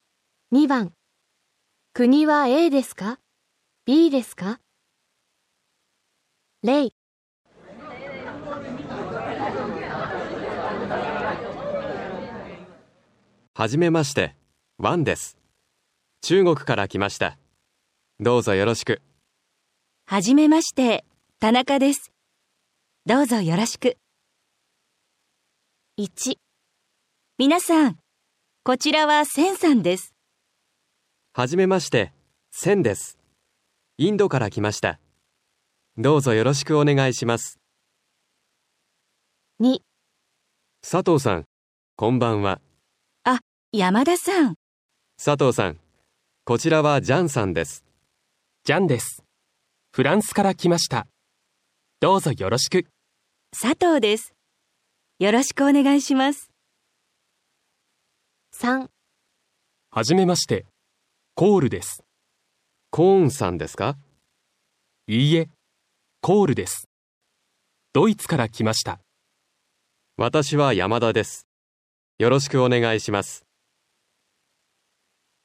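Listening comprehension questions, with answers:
2. 国は aですか、 bですか。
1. セン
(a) インド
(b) インドネシア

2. ジャン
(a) ブラジル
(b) フランス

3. コール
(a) インド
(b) ドイツ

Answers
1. (a) インド
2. (b) フランス
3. (b) ドイツ

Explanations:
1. B: 初めまして、センです。インドから 来ました。
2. C: ジャンです。フランスから 来ました。どうぞ よろしく。
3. A: いいえ、コールです。ドイツから 来ました。

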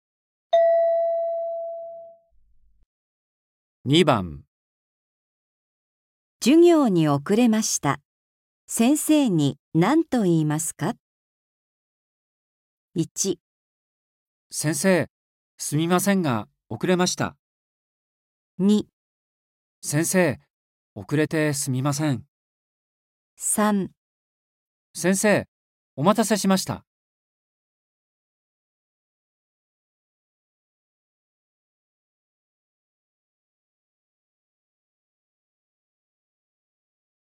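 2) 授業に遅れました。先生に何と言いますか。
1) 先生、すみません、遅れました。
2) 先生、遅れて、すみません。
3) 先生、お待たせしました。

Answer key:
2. 2) 先生、遅れて、すみません。

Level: N4

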